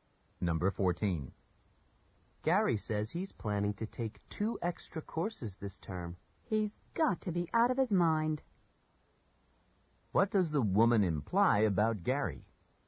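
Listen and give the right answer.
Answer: He's taking on too much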